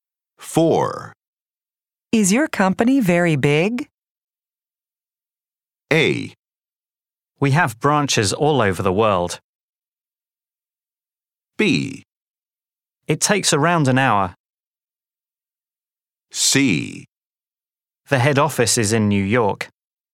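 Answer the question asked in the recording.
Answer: A: We have branches all over the world.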